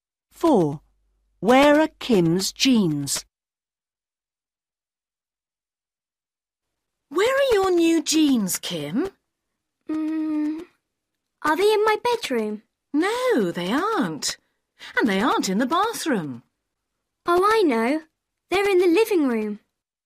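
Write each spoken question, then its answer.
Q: Where are Kim's jeans?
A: In the living room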